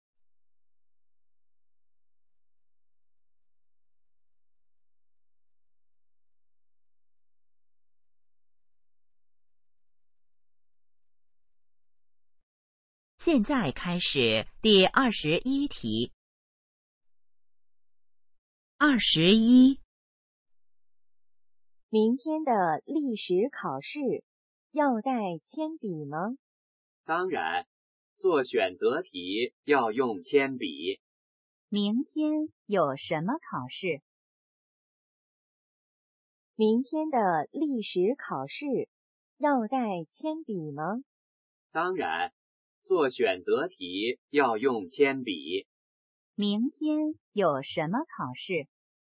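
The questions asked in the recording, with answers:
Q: 明天有什么考试?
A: 历史考试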